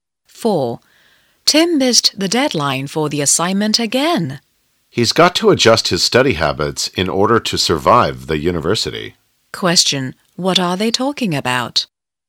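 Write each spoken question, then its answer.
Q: What are they talking about?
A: Tim's study habits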